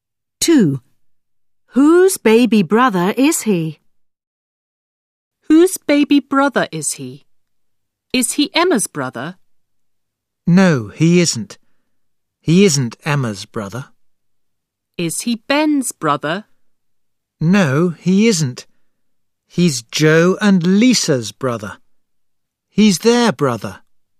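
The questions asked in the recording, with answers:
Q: Whose baby brother is he?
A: Joe and Lisa's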